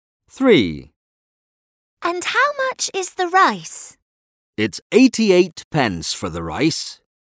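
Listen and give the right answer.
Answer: 88 pence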